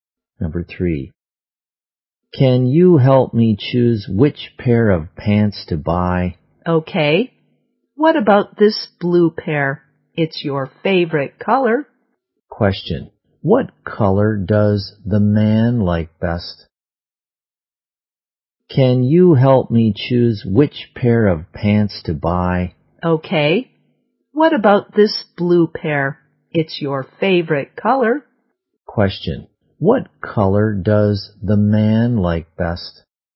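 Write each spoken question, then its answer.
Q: What color does the man like best?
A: Blue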